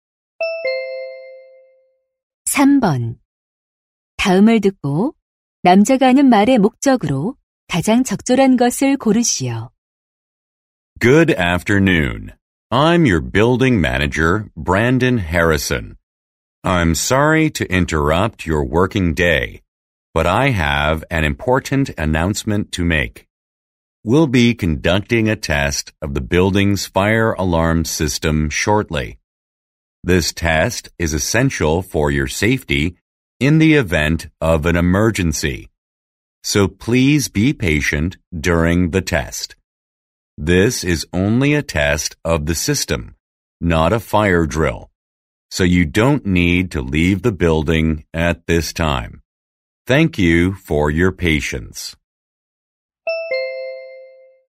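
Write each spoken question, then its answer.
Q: 다음을 듣고 남자가 하는 말의 목적으로 가장 적절한 것을 고르시오.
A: 건물 화재경보 시스템 점검을 안내하려고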